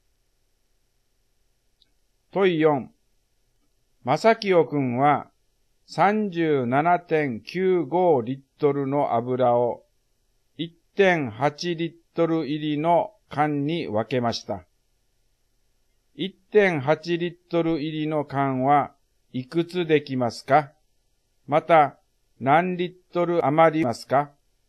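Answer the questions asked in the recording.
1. 21缶
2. 0.15リットル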